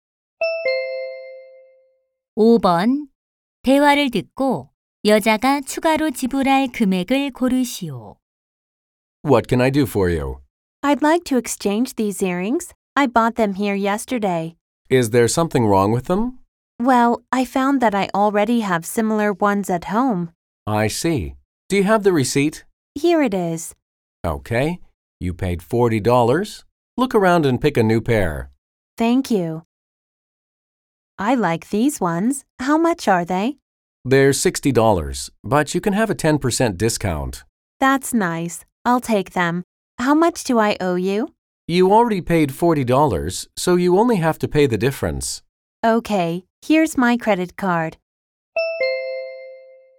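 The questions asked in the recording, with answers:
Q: 대화를 듣고 여자가 추가로 지불할 금액을 고르시오.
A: $14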